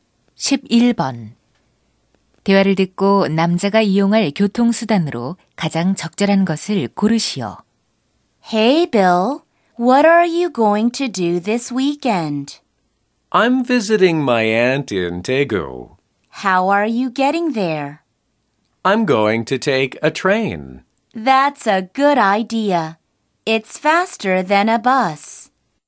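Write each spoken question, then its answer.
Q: 대화를 듣고 남자가 이용할 교통수단으로 가장 적절한 것을 고르시오.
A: 기차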